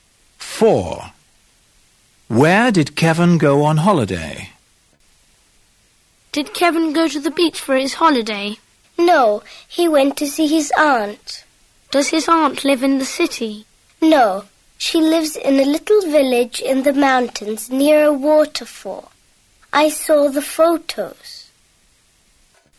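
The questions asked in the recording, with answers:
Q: Where did Kevin go on holiday?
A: To his aunt's village in the mountains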